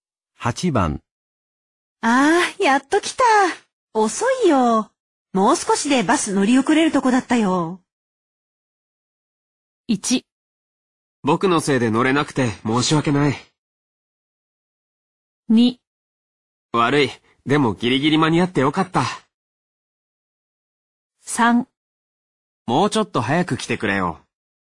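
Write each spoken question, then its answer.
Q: ああ、やっと来た。遅いよ。もう少しでバス乗り遅れるとこだったよ。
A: 2: 悪い。でもギリギリ間に合ってよかった。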